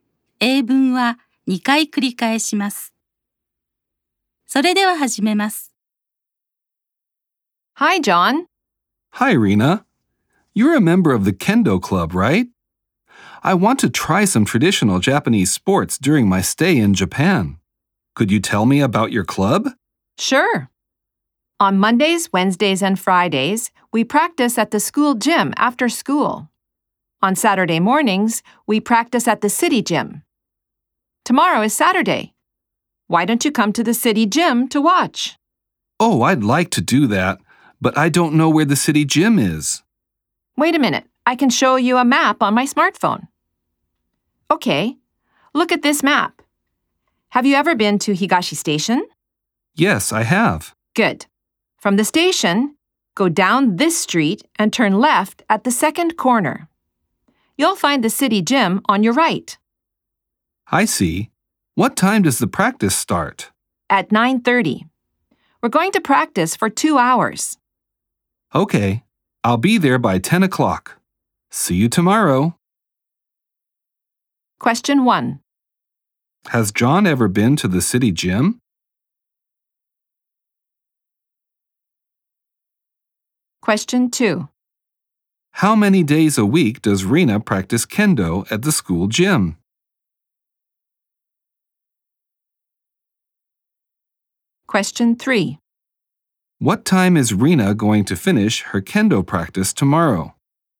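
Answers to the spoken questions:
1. No, he hasn't.
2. Three days
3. At 11:30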